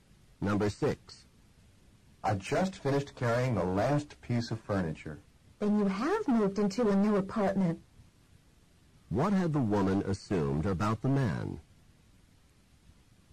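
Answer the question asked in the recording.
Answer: That he had not moved into a new apartment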